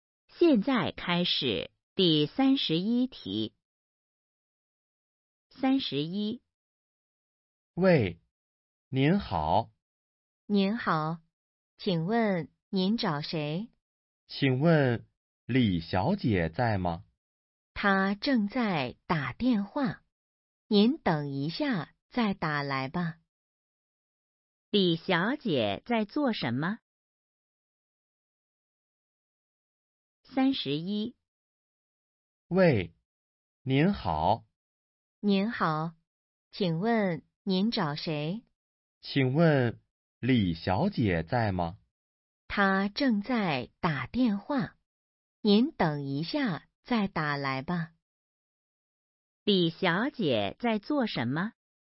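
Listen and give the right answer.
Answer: 打电话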